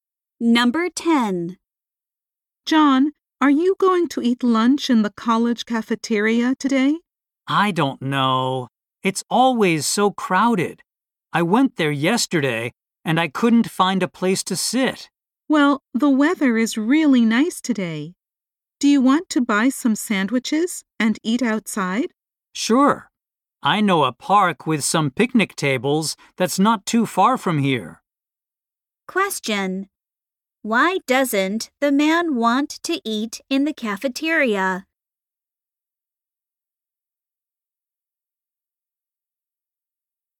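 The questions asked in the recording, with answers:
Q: Why doesn't the man want to eat in the cafeteria?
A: It is always too crowded.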